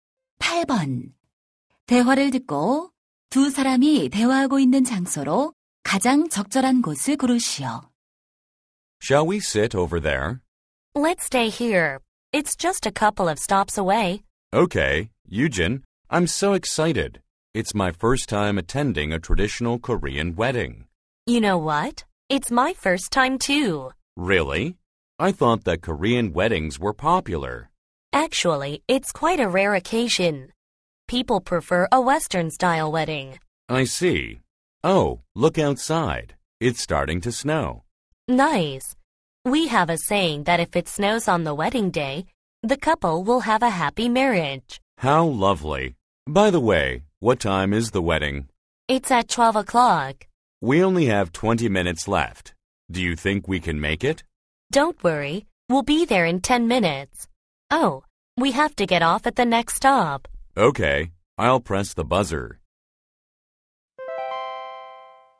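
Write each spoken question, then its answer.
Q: 대화를 듣고 두 사람이 대화하고 있는 장소로 가장 적절한 곳을 고르시오.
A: 버스 안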